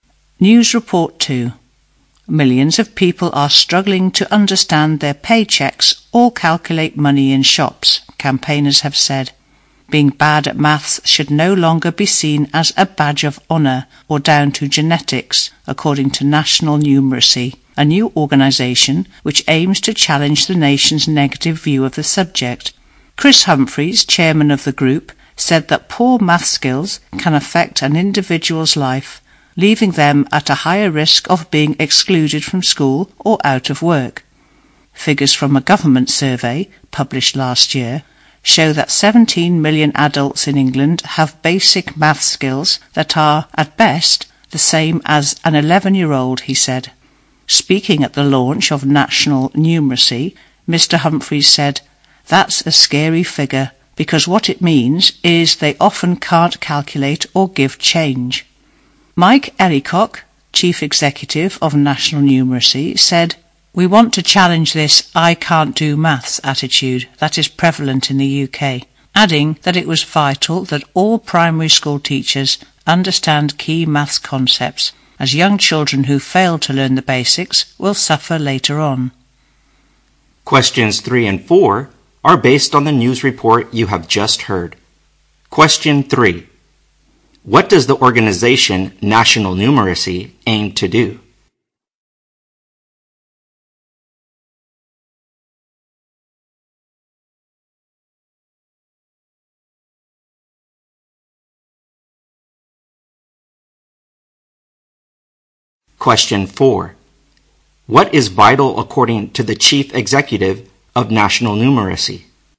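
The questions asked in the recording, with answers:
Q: What does the organization National Numeracy aim to do?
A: Challenge the nation's negative view of maths.

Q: What is vital according to the chief executive of National Numeracy?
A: That all primary school teachers understand key maths concepts.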